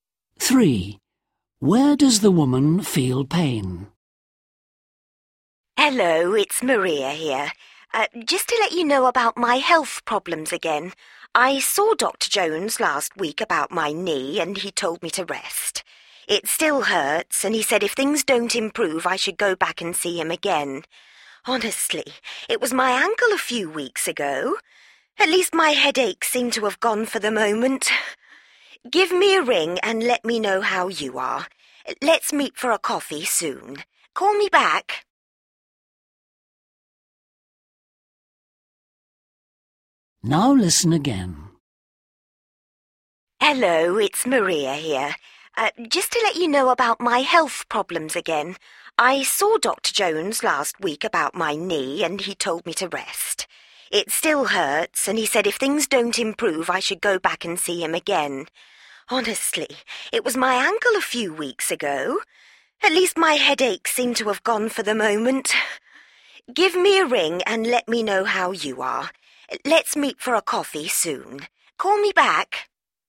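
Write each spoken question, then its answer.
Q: Where does the woman feel pain?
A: in her knee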